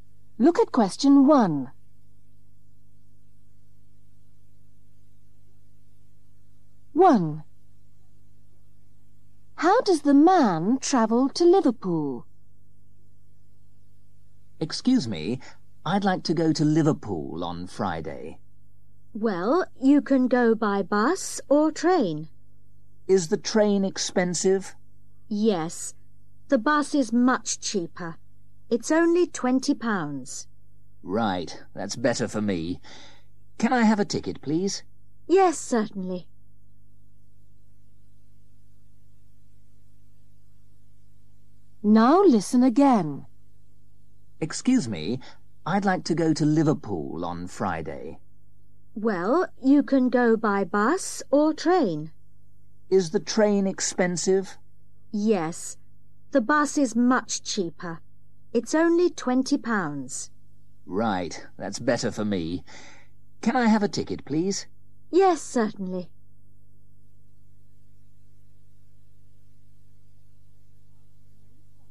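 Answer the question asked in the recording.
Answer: by bus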